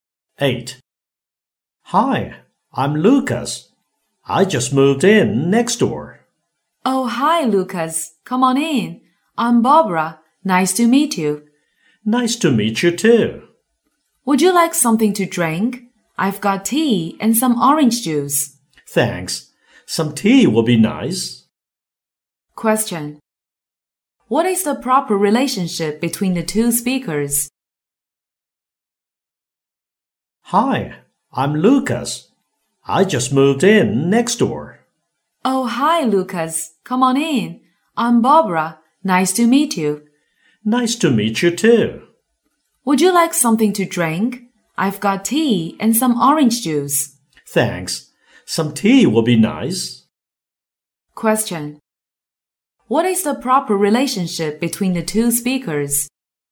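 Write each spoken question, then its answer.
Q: What is the proper relationship between the two speakers?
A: Neighbours.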